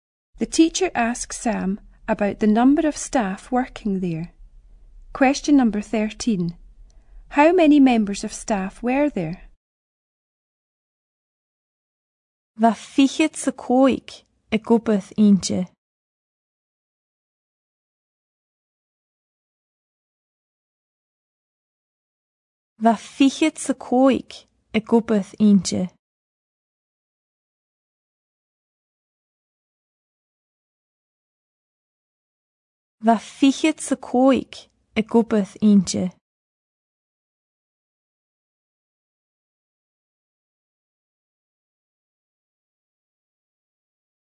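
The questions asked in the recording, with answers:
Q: How many members of staff were there?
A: 25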